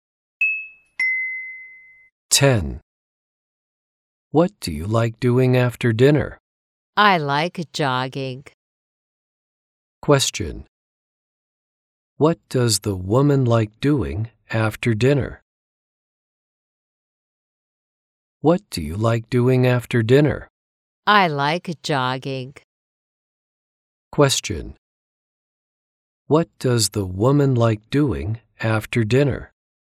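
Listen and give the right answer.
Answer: Jogging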